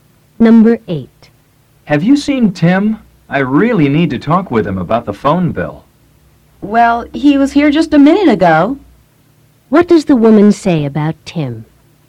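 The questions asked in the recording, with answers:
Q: What does the woman say about Tim?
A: He was there a minute ago.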